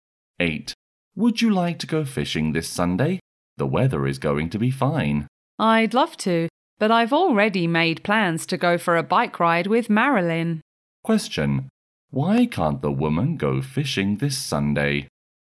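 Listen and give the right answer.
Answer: She has already made plans to go for a bike ride with Marilyn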